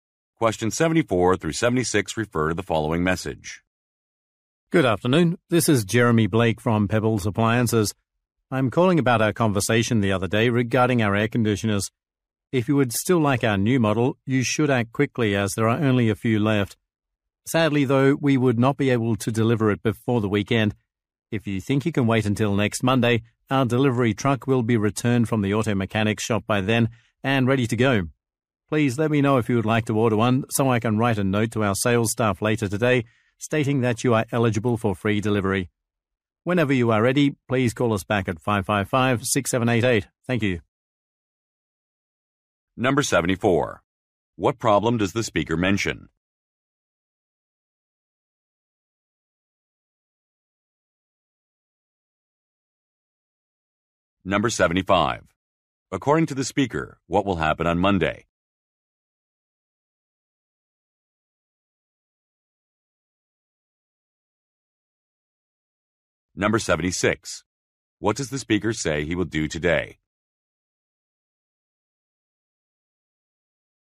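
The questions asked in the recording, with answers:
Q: What problem does the speaker mention?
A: The air conditioner can't be delivered before the weekend

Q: According to the speaker, what will happen on Monday?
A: The delivery truck will be back from the mechanic

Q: What does the speaker say he will do today?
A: Write a note to the sales staff about free delivery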